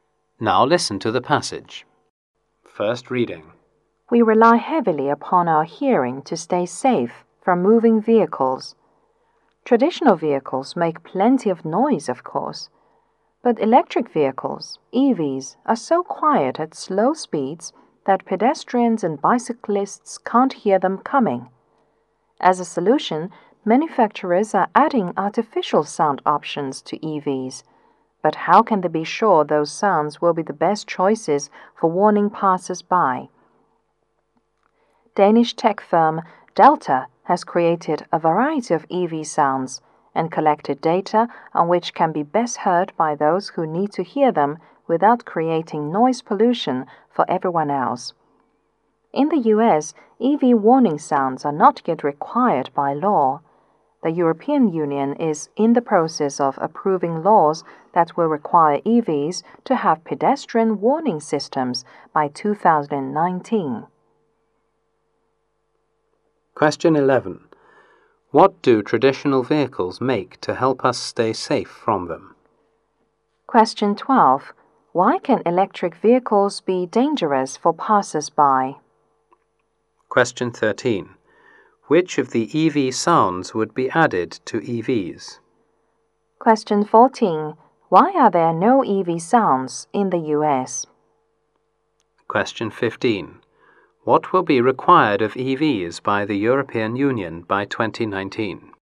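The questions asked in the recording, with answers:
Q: What do traditional vehicles make to help us stay safe from them?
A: Plenty of noise

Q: Why can electric vehicles be dangerous for passers-by?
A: They are too quiet at slow speeds

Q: Which of the EV sounds would be added to EVs?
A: Those best heard without creating noise pollution

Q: Why are there no EV sounds in the US?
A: They are not yet required by law

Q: What will be required of EVs by the European Union by 2019?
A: Pedestrian warning systems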